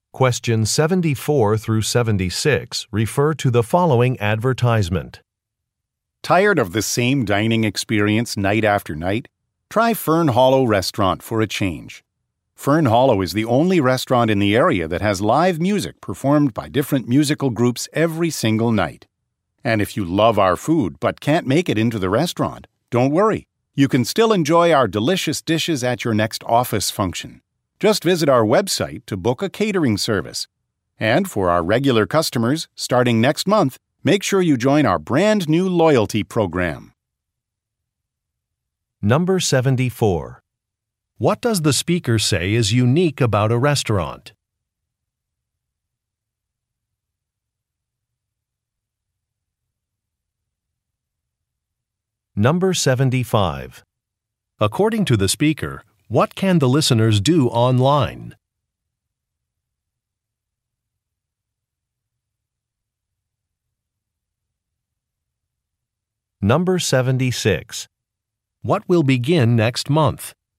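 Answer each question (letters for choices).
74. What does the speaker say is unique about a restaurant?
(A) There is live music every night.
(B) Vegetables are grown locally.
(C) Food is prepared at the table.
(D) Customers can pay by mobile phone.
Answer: A

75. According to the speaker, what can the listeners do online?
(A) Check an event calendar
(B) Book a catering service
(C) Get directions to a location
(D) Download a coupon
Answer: B

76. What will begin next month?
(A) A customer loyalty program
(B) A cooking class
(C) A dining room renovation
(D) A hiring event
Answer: A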